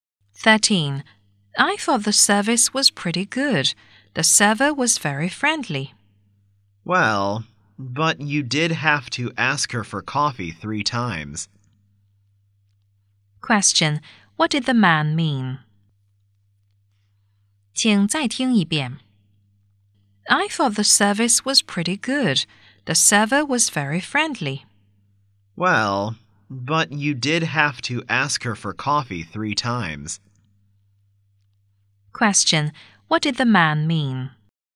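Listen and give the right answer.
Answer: The service wasn't that good.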